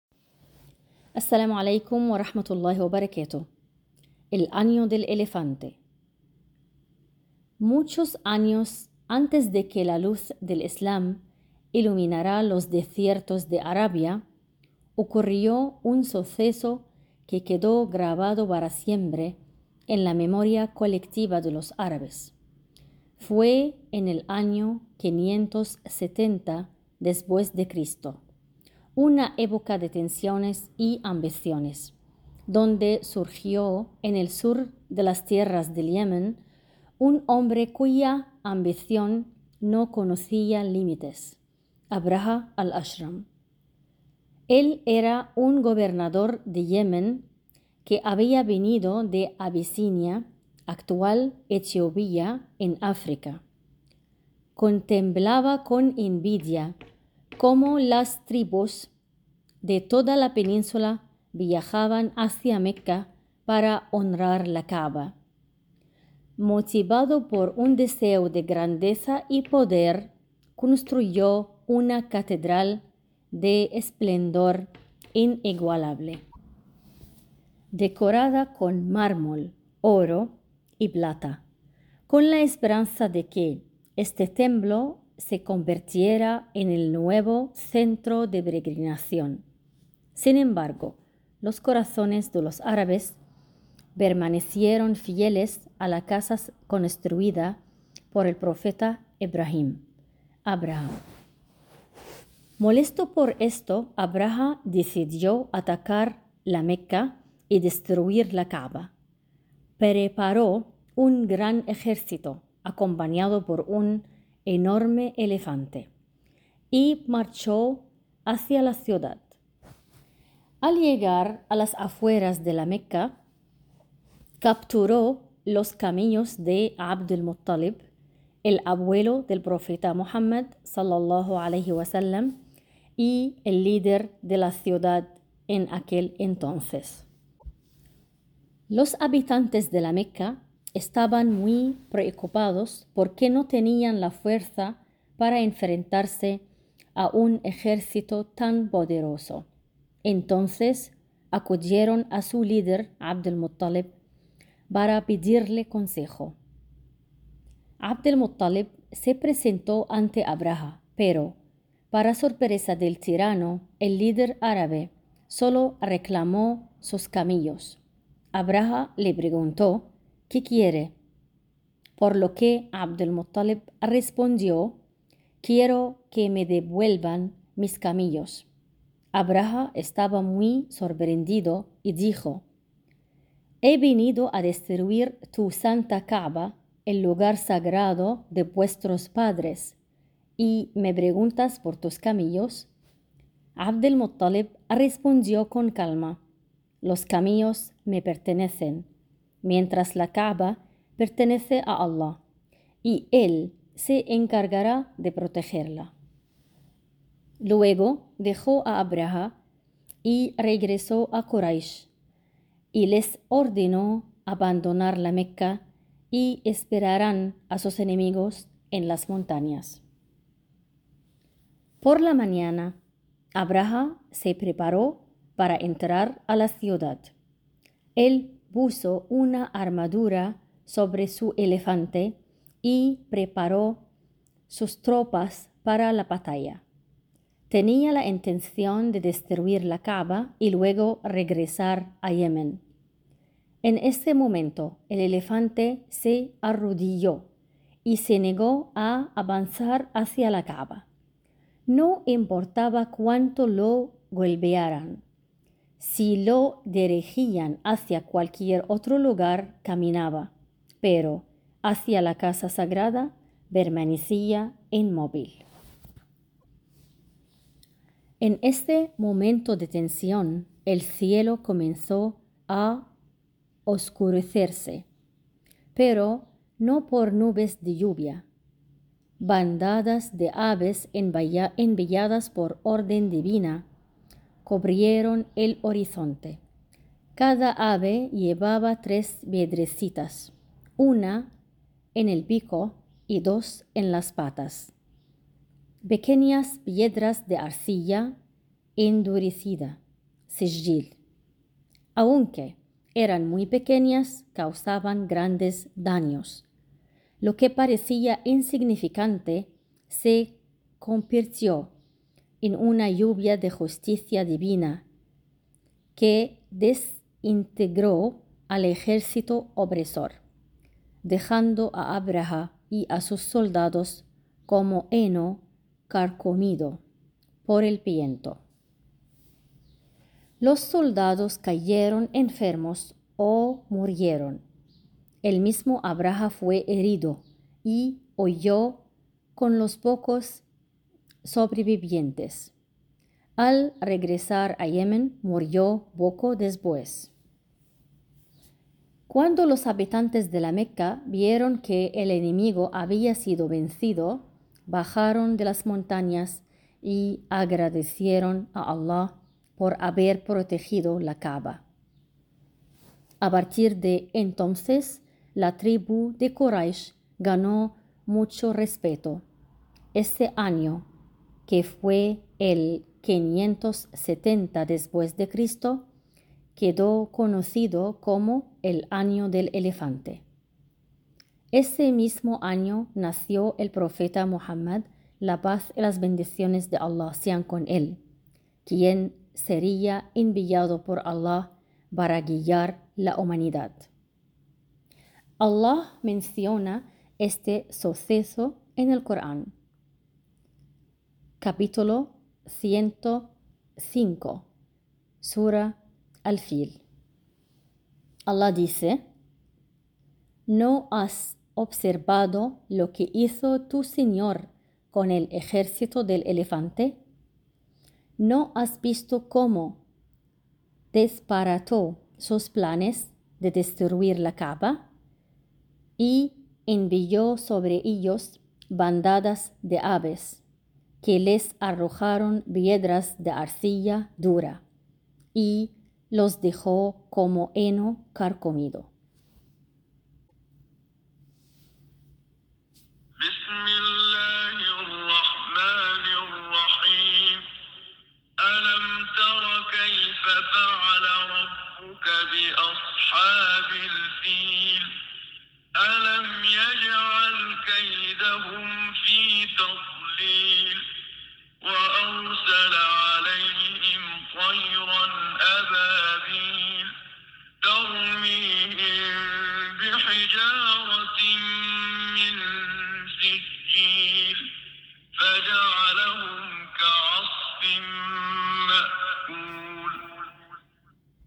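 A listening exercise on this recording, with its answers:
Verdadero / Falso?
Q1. Abrahah Al-Ashram era un gobernador de Yemen que quería que las personas peregrinaran a una gran catedral que él había construido.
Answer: Verdadero

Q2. Las tribus árabes abandonaron la Ka'bah y comenzaron a peregrinar al templo de Abrahah.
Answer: Falso

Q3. 'Abd al-Muttalib le pidió a Abrahah que no destruyera la Ka'bah, pero no mencionó nada sobre sus camellos.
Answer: Falso

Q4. El elefante se negó a avanzar cuando fue dirigido hacia la Ka'bah, aunque caminaba si lo llevaban a otro lugar.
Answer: Verdadero

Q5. Según el texto, bandadas de aves enviadas por Al-láh lanzaron pequeñas piedras que destruyeron al ejército de Abrahah.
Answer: Verdadero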